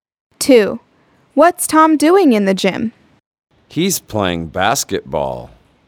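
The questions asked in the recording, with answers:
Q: What's Tom doing in the gym?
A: Playing basketball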